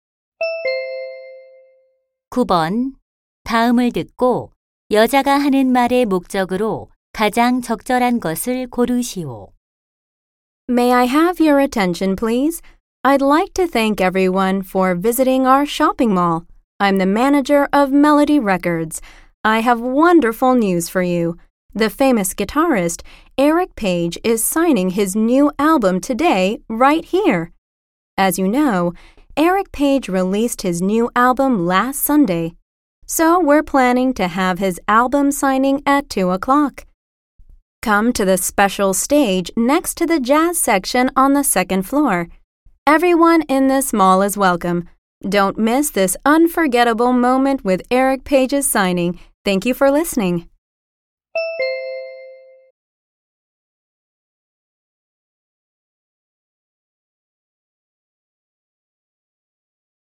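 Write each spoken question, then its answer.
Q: 다음을 듣고 여자가 하는 말의 목적으로 가장 적절한 것을 고르시오.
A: 음반 사인회를 안내하려고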